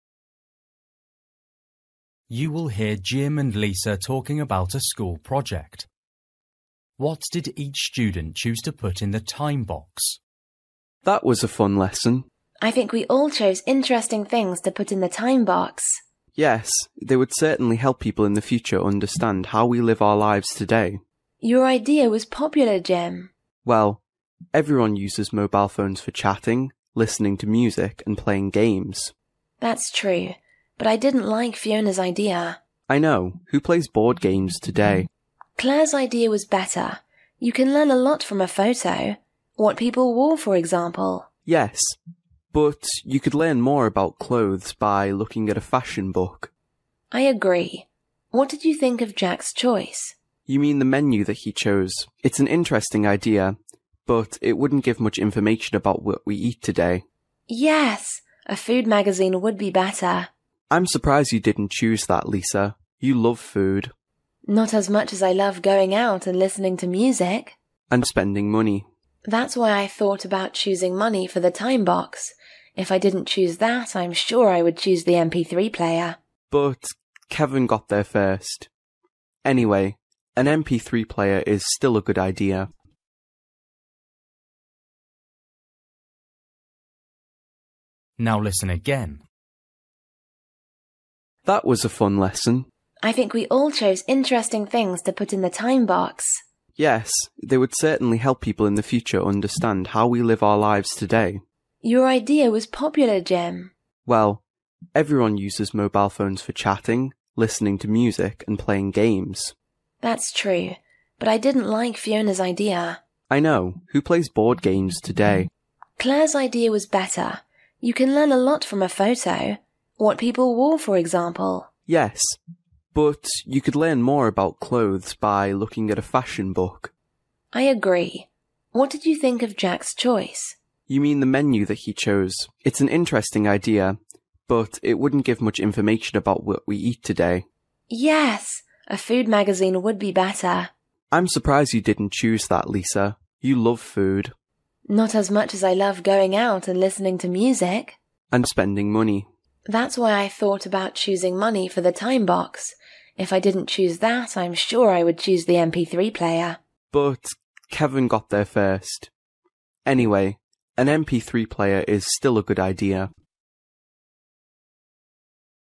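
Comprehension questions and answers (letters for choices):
For each question, choose the correct answer.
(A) board games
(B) mobile phone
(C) money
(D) menu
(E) fashion book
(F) MP3 player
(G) photo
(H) food magazine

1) Fiona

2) Clare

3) Jack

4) Lisa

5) Kevin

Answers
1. A
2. G
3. D
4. C
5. F

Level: Luyện nghe trình độ A2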